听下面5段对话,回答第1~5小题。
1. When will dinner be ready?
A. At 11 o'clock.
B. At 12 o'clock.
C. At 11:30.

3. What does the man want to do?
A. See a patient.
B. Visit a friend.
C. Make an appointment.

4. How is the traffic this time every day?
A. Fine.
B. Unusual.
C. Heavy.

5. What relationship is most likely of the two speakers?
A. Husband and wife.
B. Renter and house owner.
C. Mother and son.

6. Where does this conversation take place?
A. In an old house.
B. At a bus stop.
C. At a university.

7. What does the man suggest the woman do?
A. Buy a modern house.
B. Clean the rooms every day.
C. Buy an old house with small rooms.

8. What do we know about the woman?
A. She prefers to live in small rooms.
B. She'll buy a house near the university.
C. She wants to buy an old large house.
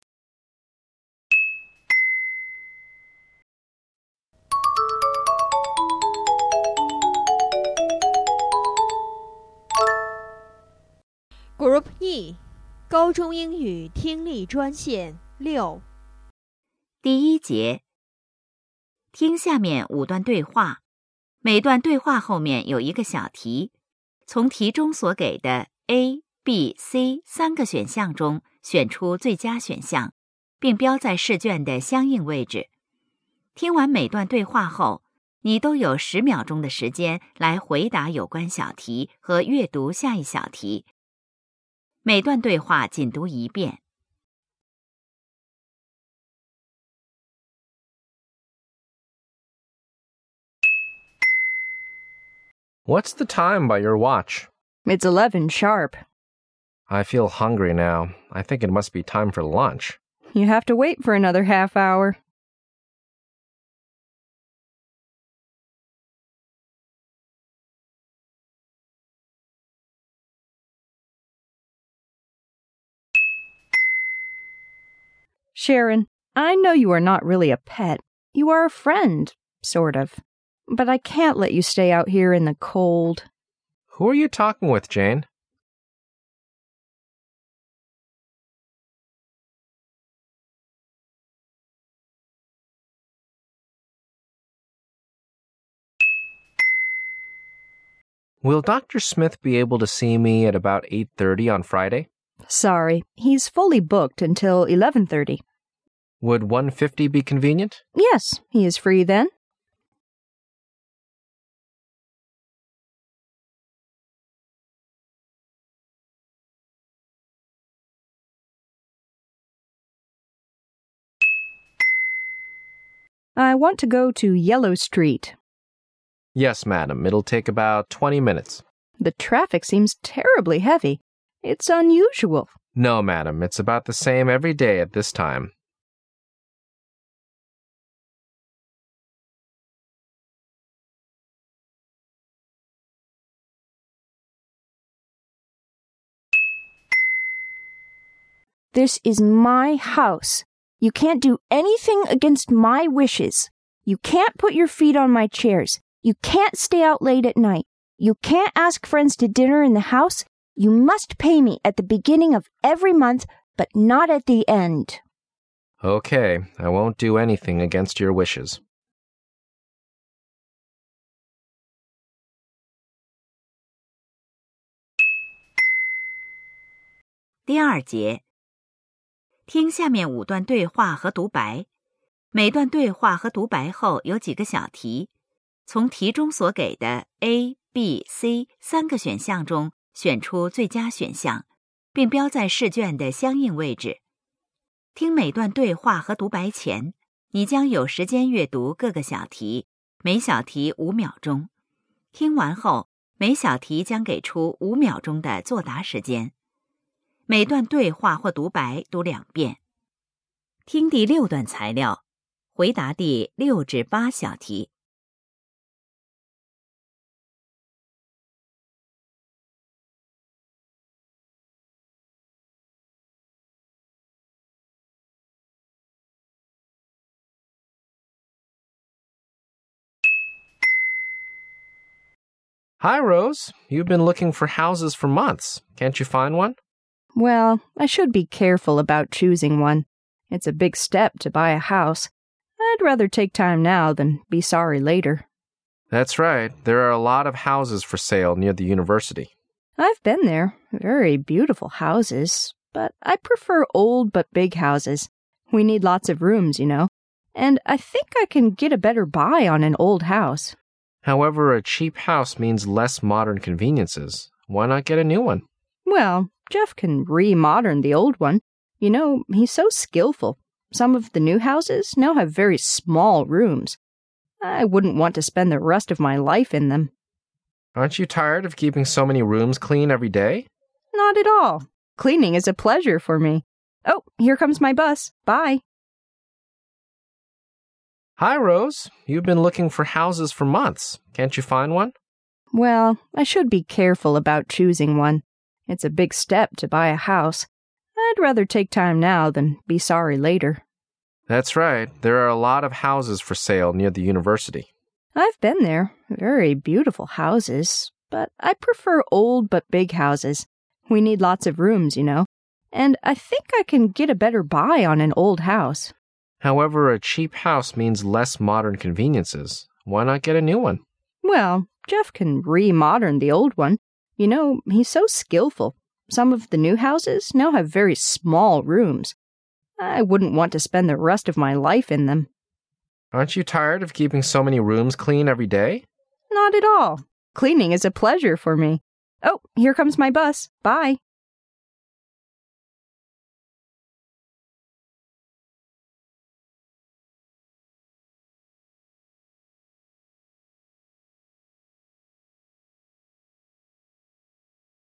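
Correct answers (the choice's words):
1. At 11:30.
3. Make an appointment.
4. Heavy.
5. Renter and house owner.
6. At a bus stop.
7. Buy a modern house.
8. She wants to buy an old large house.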